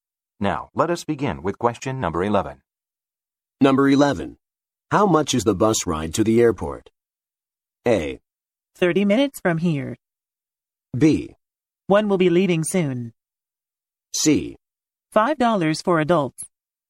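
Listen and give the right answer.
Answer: C: $5 for adults.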